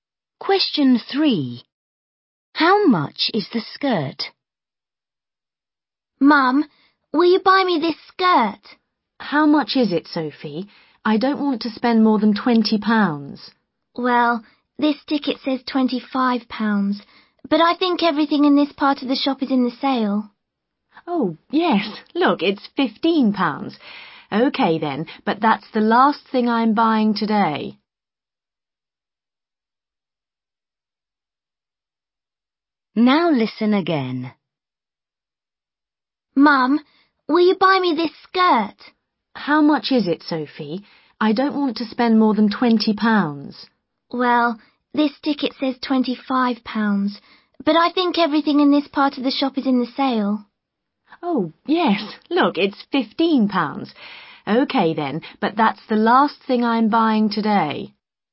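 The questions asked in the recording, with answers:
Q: How much is the skirt?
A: £15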